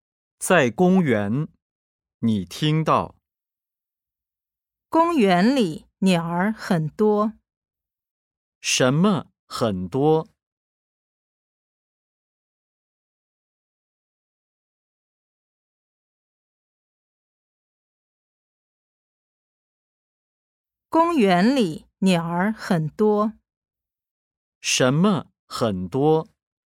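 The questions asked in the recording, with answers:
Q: 什么很多?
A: 鸟儿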